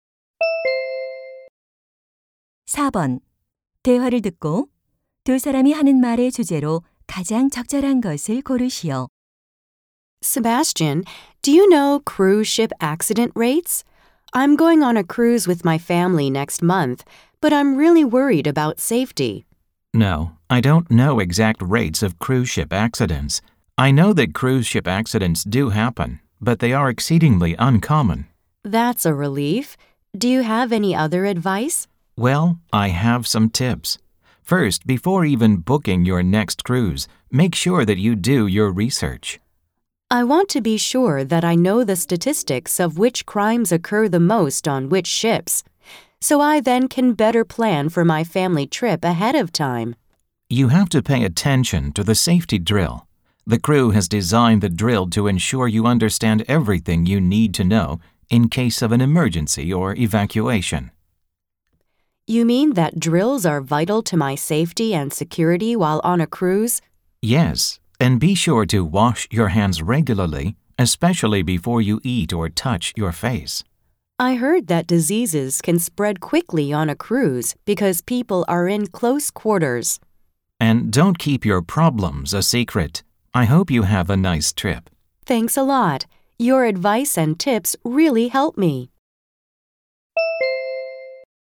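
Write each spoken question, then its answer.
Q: 대화를 듣고 두 사람이 하는 말의 주제로 가장 적절한 것을 고르시오.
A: 크루즈 여행 안전 수칙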